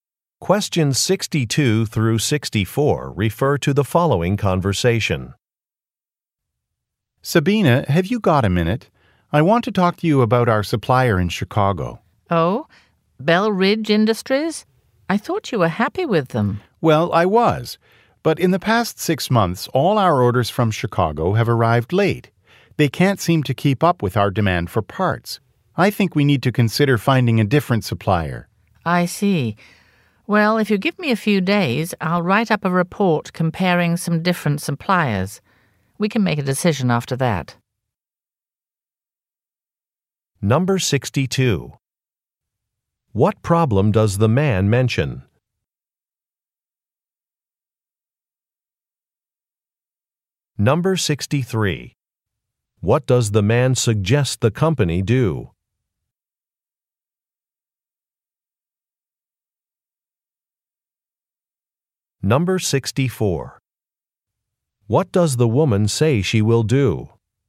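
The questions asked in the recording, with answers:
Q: What problem does the man mention?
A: Orders from the supplier have arrived late

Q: What does the man suggest the company do?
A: Find a different supplier

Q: What does the woman say she will do?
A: Write a report comparing suppliers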